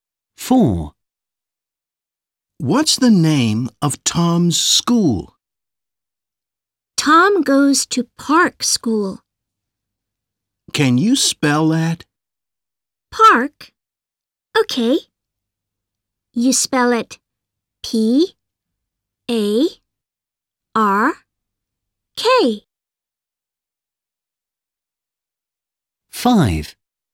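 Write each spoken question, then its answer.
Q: What's the name of Tom's school?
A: Park School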